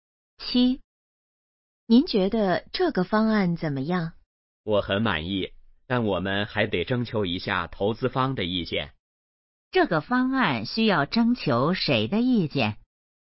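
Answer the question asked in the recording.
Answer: 投资方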